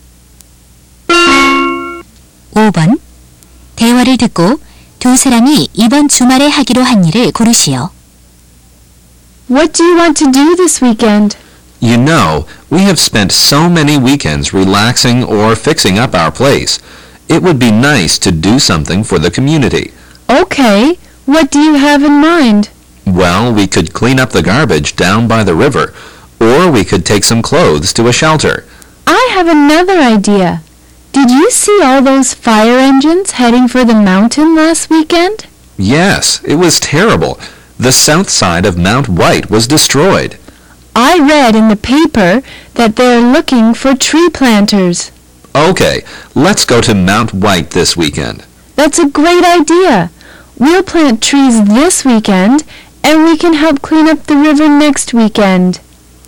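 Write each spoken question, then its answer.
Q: 대화를 듣고 두 사람이 이번 주말에 하기로 한 일을 고르시오.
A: 화이트 산에서 나무 심기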